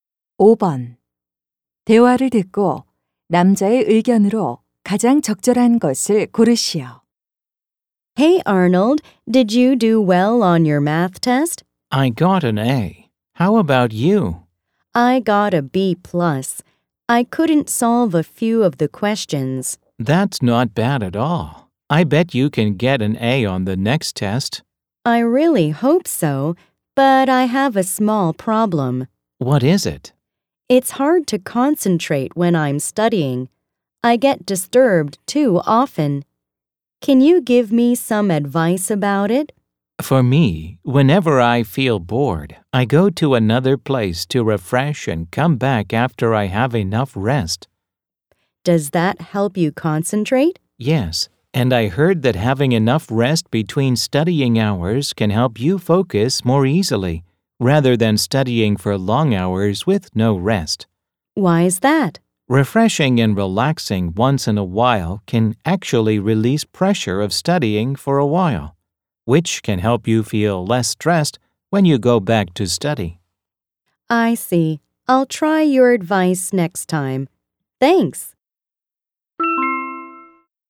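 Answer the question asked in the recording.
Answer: 공부 중간에 충분히 쉬는 것이 집중에 도움이 된다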